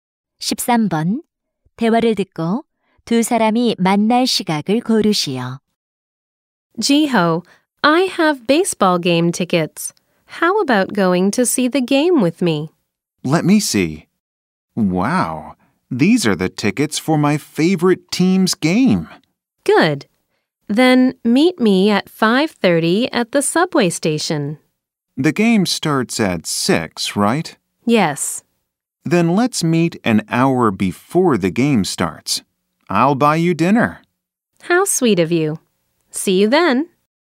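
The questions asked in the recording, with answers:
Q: 대화를 듣고 두 사람이 만날 시각을 고르시오.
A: 5시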